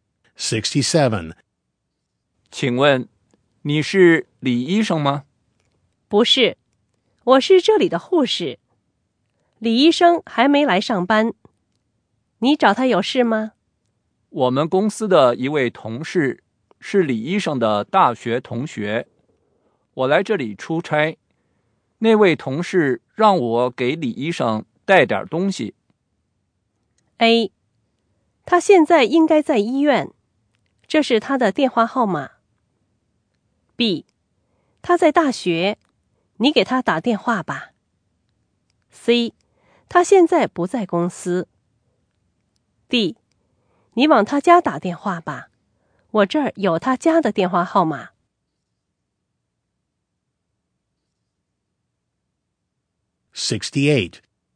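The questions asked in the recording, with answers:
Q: 我们公司的一位同事是李医生的大学同学,我来这里出差,那位同事让我给李医生带点东西。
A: D: 你往他家打电话吧,我这儿有他家的电话号码。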